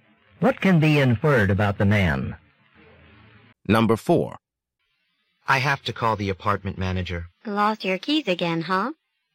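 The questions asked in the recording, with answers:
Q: What does the woman imply?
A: The man has lost his keys before.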